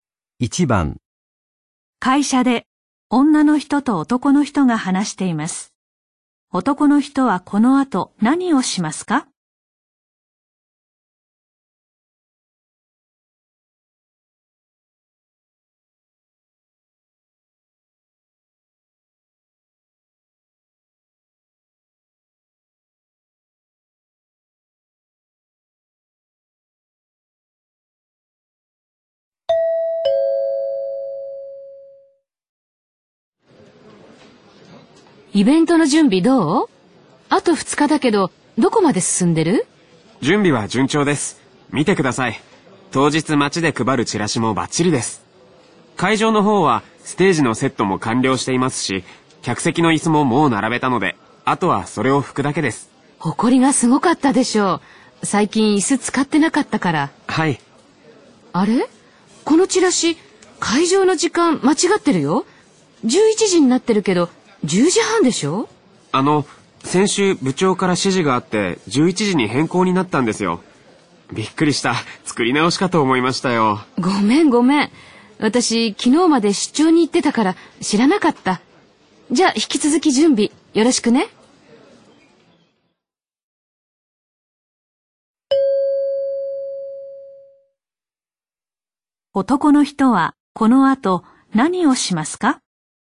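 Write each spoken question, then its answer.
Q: 男の人はこの後何をしますか?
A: 客席の椅子を拭く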